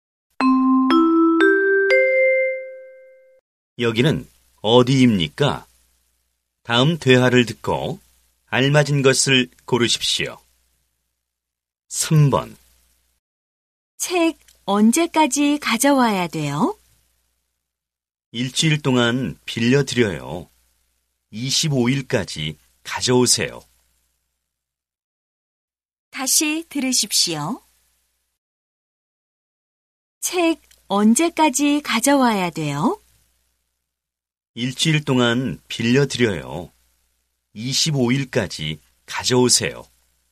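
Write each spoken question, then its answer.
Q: 여기는 어디입니까?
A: 도서관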